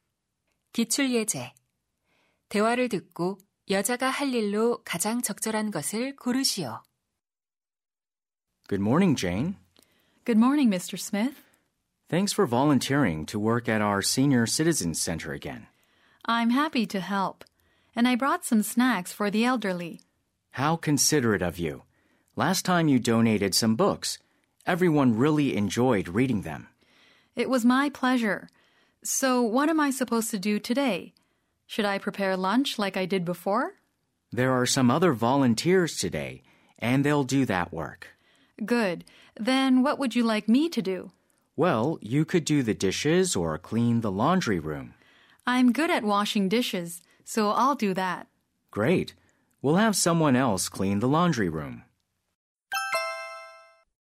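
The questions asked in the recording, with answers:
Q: 대화를 듣고 여자가 할 일로 가장 적절한 것을 고르시오.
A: 설거지하기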